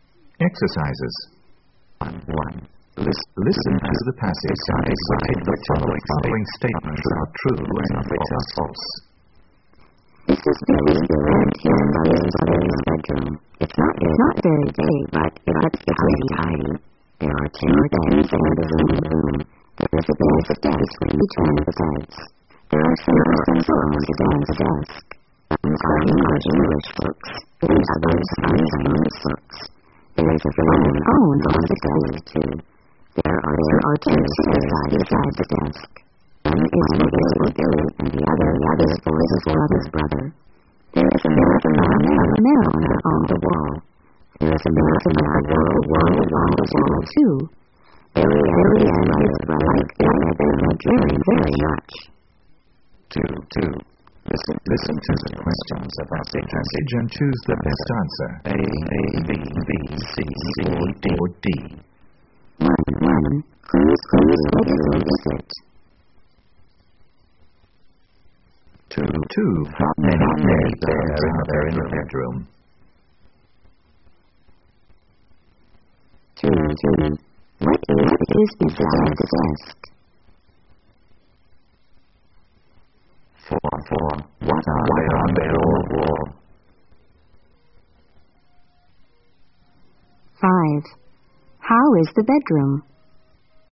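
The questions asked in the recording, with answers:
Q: How is the bedroom?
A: Not very big, but pretty tidy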